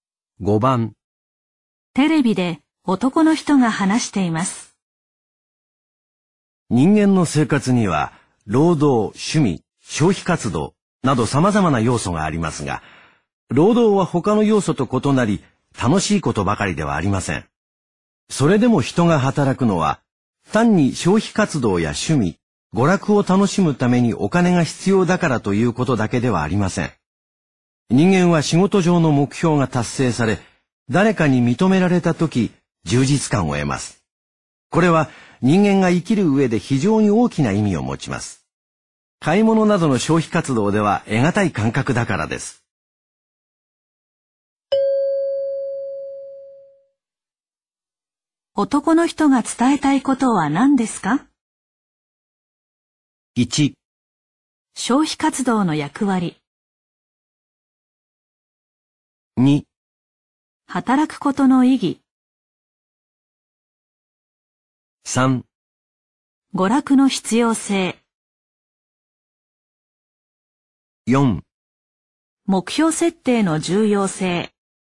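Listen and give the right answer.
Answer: 2: 働くことの意義。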